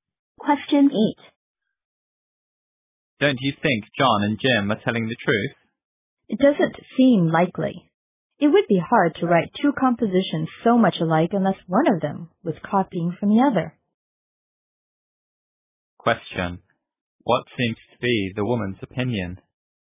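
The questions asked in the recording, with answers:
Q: What seems to be the woman's opinion?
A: John and Jim are not telling the truth; one copied the other's composition.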